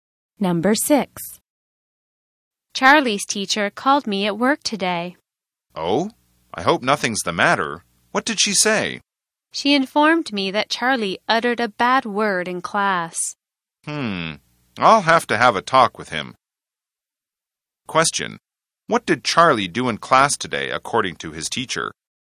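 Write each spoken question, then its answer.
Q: What did Charlie do in class today, according to his teacher?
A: He said a bad word.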